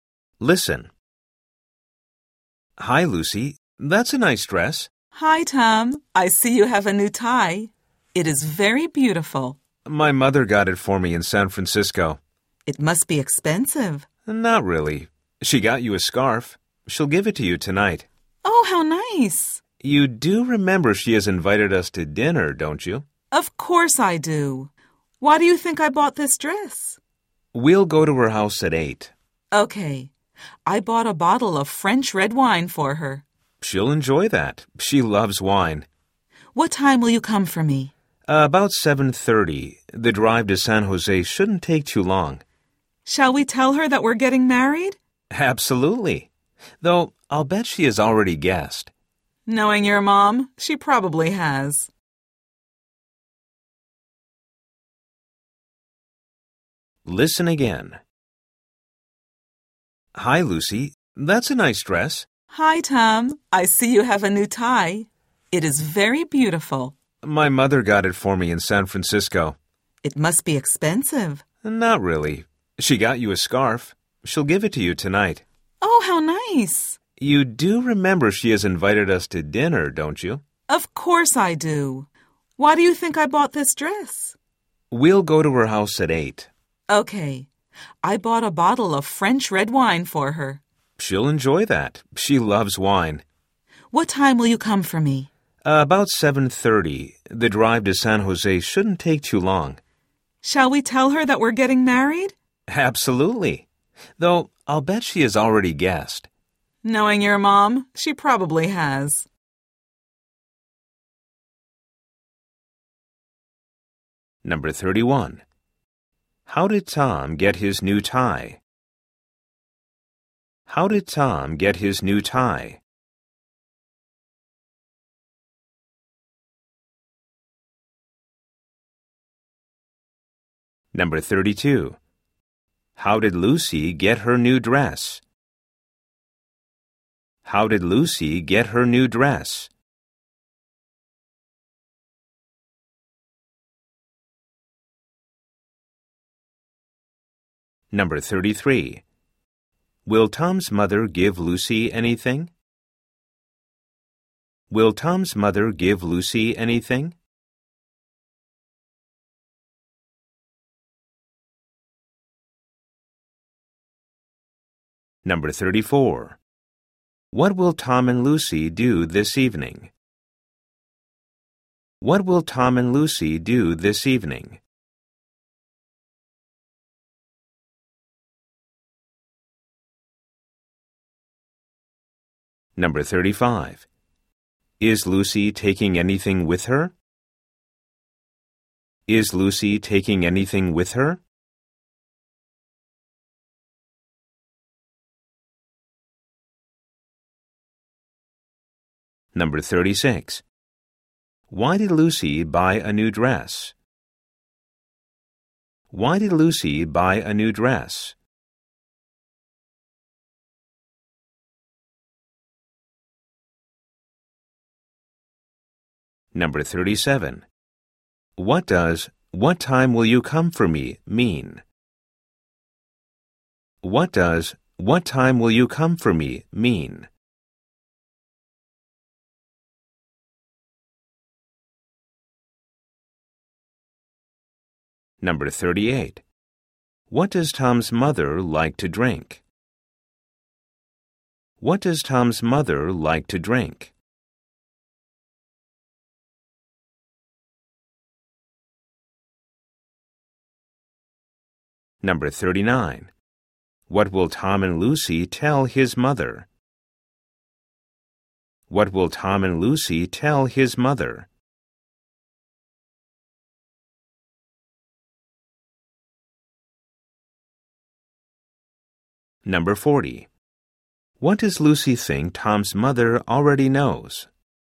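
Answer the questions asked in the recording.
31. His mother got it for him in San Francisco
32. She bought it
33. Yes, a scarf
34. Have dinner at Tom's mother's house
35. Yes, a bottle of French red wine
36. For the dinner with Tom's mother
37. What time will you pick me up?
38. Wine
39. That they are getting married
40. That they are getting married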